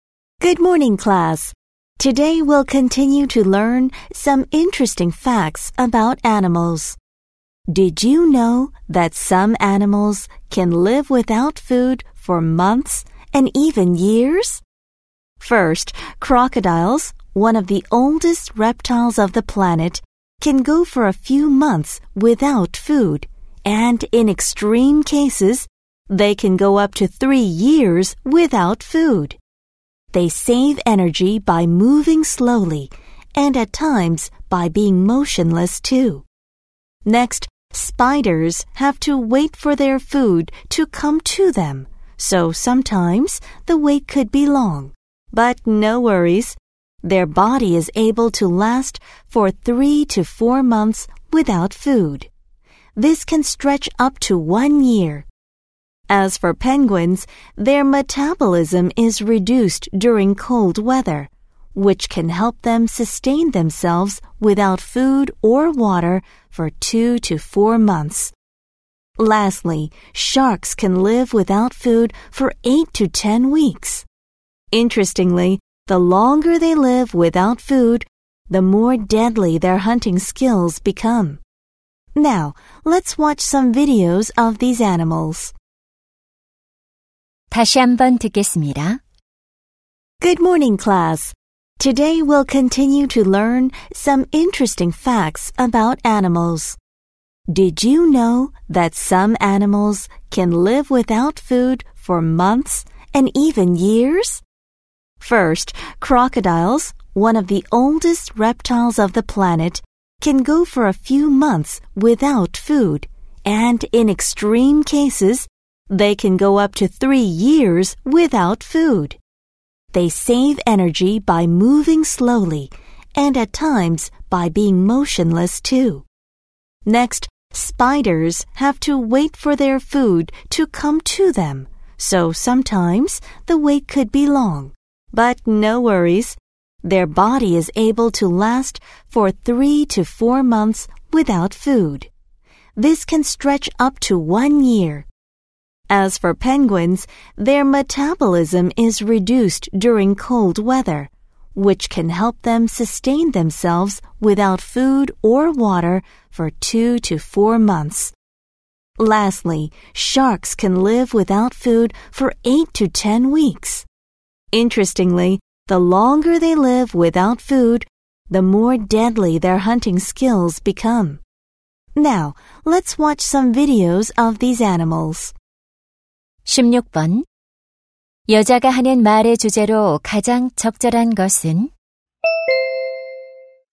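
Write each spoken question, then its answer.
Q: 여자가 하는 말의 주제로 가장 적절한 것은?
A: 오랫동안 먹이 없이 살 수 있는 동물들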